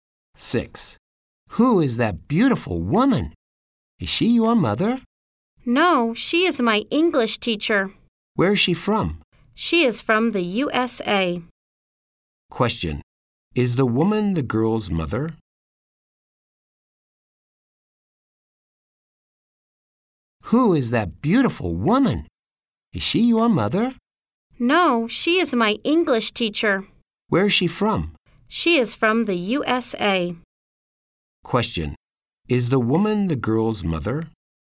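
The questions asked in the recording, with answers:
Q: Is the woman the girl's mother?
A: No, she is her English teacher.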